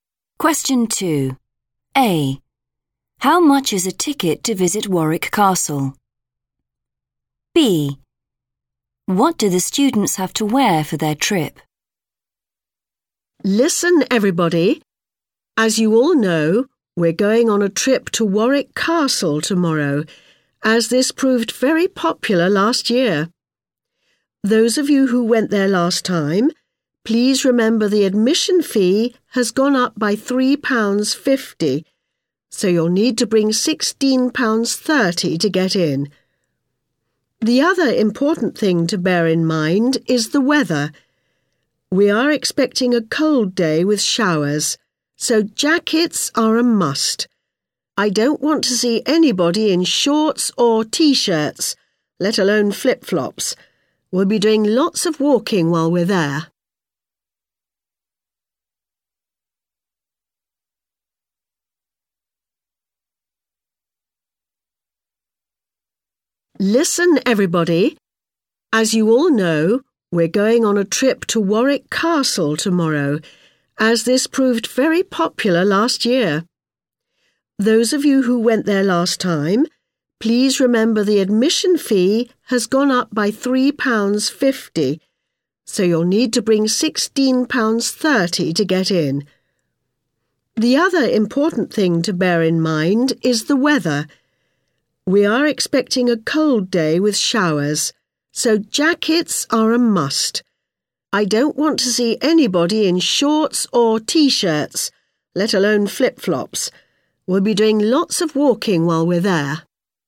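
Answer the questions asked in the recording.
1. £16.30
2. Jackets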